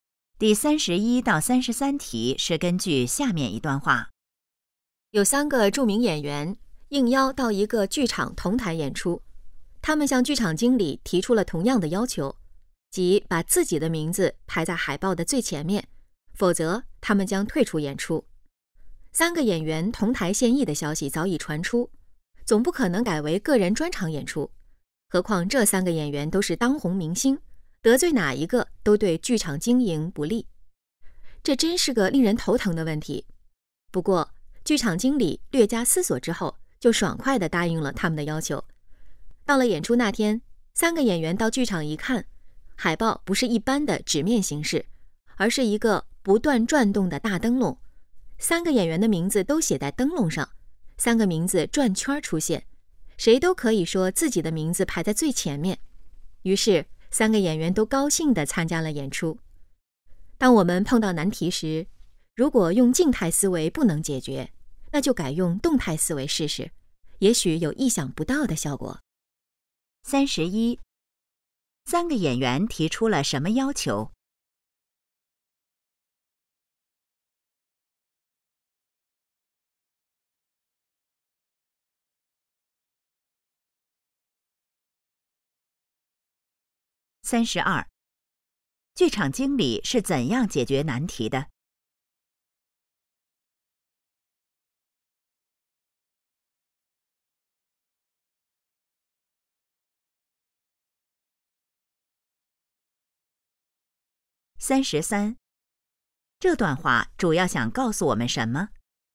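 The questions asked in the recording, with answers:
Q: 三个演员提出了什么要求?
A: 把自己的名字排在海报的最前面

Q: 剧场经理是怎样解决难题的?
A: 把三个名字写在不断转动的大灯笼上

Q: 这段话主要想告诉我们什么?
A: 静态思维解决不了难题时,改用动态思维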